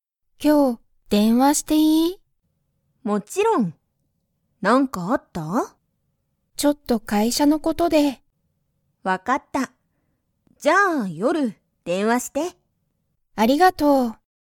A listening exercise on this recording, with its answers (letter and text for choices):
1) アヤは、____電話(でんわ)する。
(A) 今(いま)すぐ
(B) 会社(かいしゃ)に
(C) 夜(よる)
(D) もう少(すこ)し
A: (C) 夜(よる)

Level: Level 1